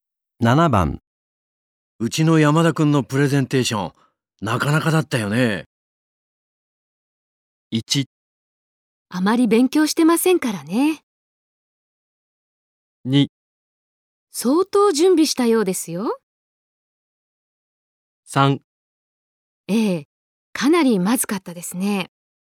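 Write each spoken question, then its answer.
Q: うちの山田くんのプレゼンテーション、なかなかだったよね。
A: 2: 相当準備したようですよ。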